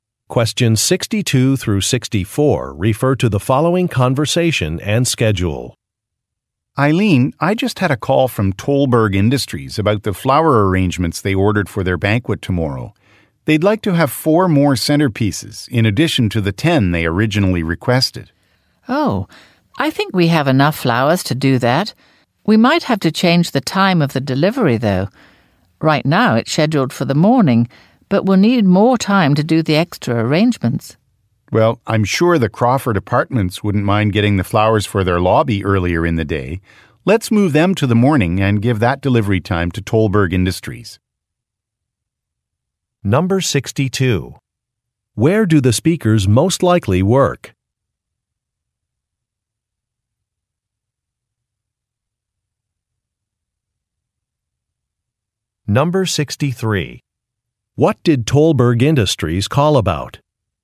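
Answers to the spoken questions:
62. At a flower shop
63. To order four more centerpieces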